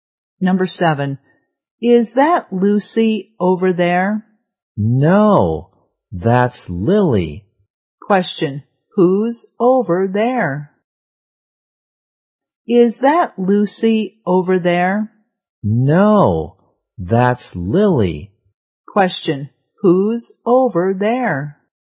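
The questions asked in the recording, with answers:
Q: who's over there?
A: Lily.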